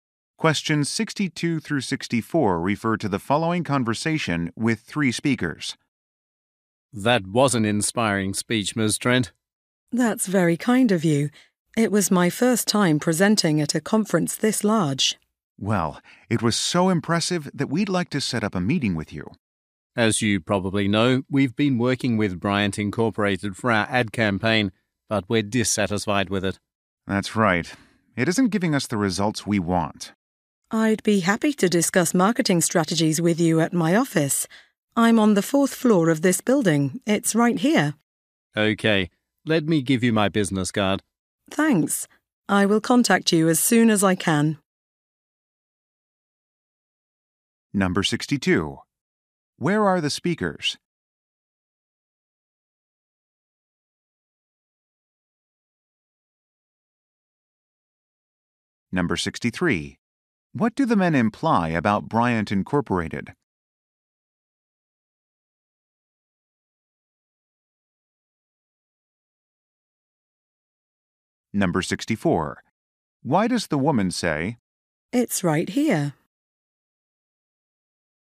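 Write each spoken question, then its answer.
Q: Where are the speakers?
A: At a conference

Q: What do the men imply about Bryant Incorporated?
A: They are unhappy with its ad campaign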